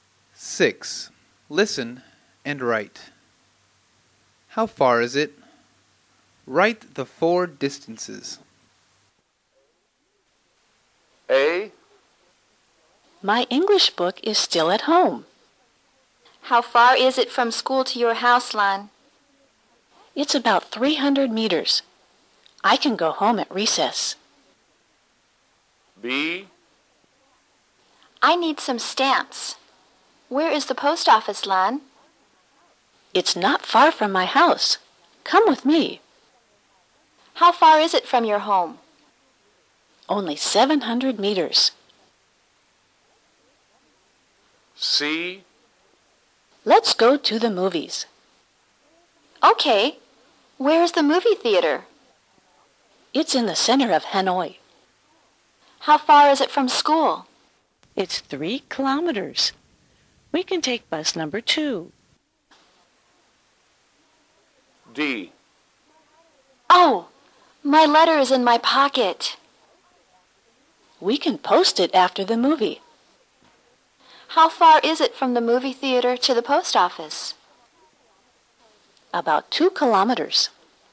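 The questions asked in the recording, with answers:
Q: How far is it from school to your house, Lan?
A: about 300 meters

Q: How far is it from your home?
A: 700 meters

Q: How far is it from school?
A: 3 kilometers

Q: How far is it from the movie theater to the post office?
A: about 2 kilometers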